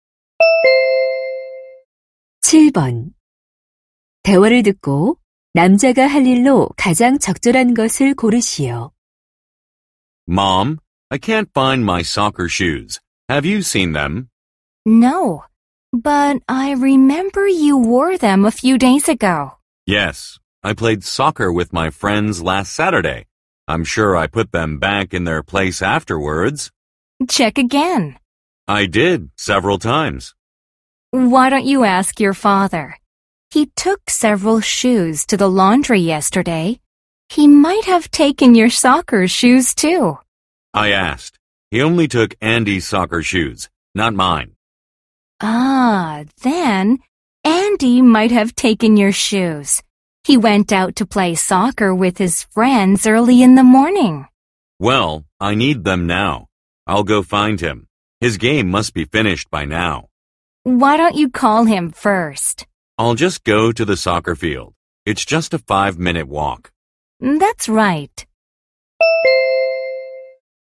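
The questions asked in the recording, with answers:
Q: 대화를 듣고 남자가 할 일로 가장 적절한 것을 고르시오.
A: 축구장에 가서 Andy 찾기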